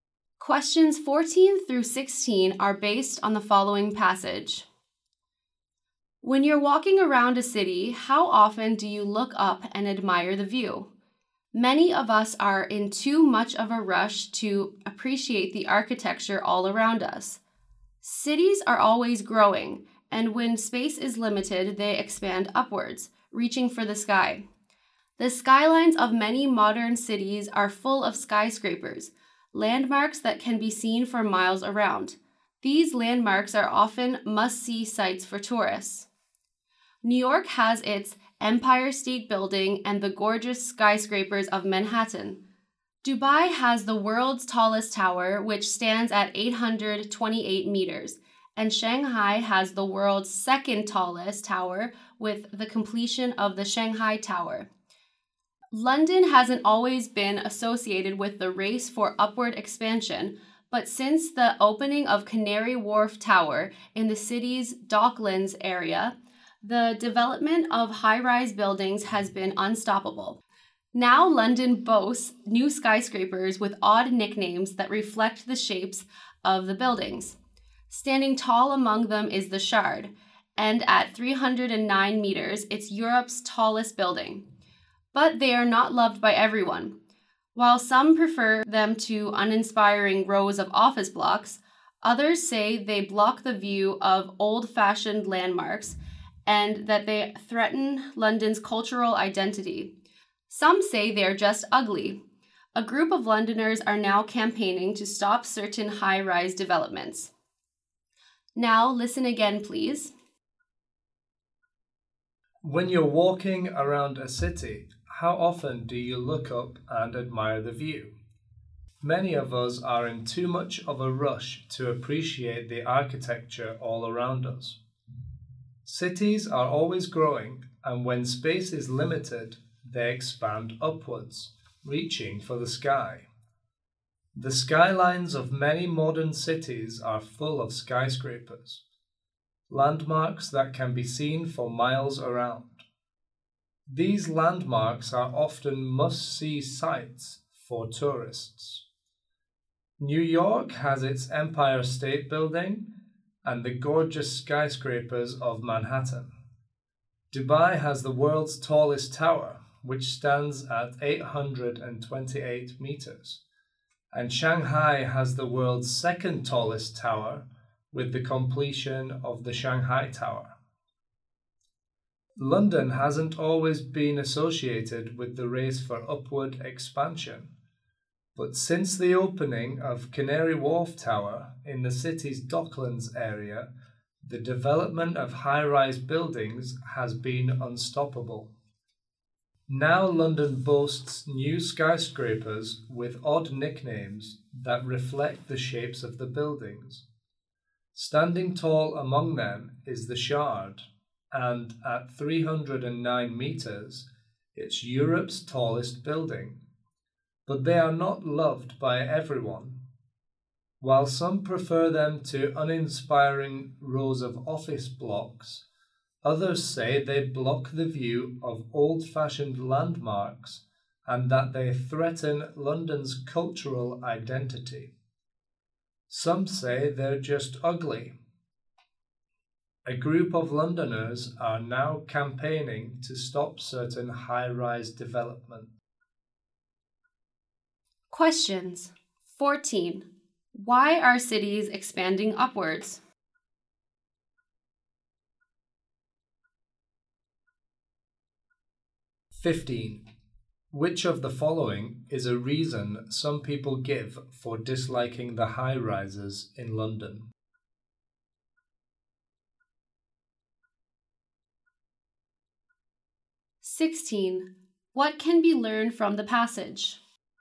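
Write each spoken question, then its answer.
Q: Why are cities expanding upwards?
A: Because space is limited

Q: Which of the following is a reason some people give for disliking the high-rises in London?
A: They block the view of old landmarks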